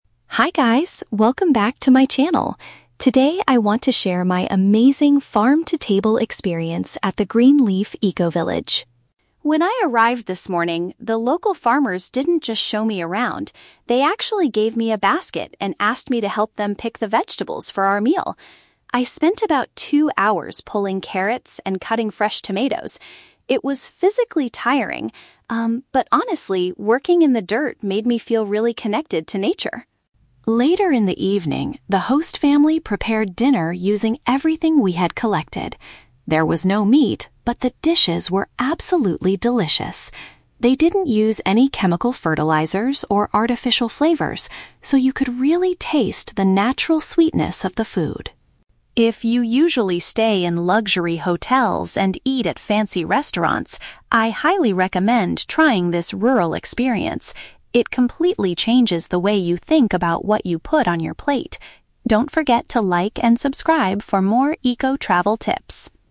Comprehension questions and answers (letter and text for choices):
Listen to a travel vlogger talking about her recent trip. Choose the correct answer (A, B, or C) for each question.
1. What did the vlogger do during the morning?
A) She gathered fresh ingredients from the garden.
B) She walked around to take photos of the farm.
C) She learned how to plant new carrot seeds.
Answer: A) She gathered fresh ingredients from the garden.

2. What was special about the evening meal?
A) It contained a lot of expensive local meat.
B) It was completely made of organic produce.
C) It was cooked by a famous chef from the city.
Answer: B) It was completely made of organic produce.

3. Why does the vlogger recommend this kind of trip?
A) It is much cheaper than staying in a luxury hotel.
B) It helps you appreciate your food much more.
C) It teaches you how to open your own restaurant.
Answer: B) It helps you appreciate your food much more.

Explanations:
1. Lily says she helped "pick the vegetables for our meal" and spent time "pulling carrots and cutting fresh tomatoes". This is paraphrased as "gathered fresh ingredients".
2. Lily explains that they didn't use any "chemical fertilizers or artificial flavors", which means the food was "organic produce".
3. Lily recommends the trip because it "completely changes the way you think about what you put on your plate" (paraphrased as "appreciate your food much more").

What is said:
Lily: Hi guys, welcome back to my channel! Today, I want to share my amazing "farm-to-table" experience at the Green Leaf Eco-Village.
When I arrived this morning, the local farmers didn't just show me around. They actually gave me a basket and asked me to help them pick the vegetables for our meal. I spent about two hours pulling carrots and cutting fresh tomatoes. It was physically tiring, um, but honestly, working in the dirt made me feel really connected to nature.
Later in the evening, the host family prepared dinner using everything we had collected. There was no meat, but the dishes were absolutely delicious. They didn't use any chemical fertilizers or artificial flavors, so you could really taste the natural sweetness of the food.
If you usually stay in luxury hotels and eat at fancy restaurants, I highly recommend trying this rural experience. It completely changes the way you think about what you put on your plate. Don't forget to like and subscribe for more eco-travel tips!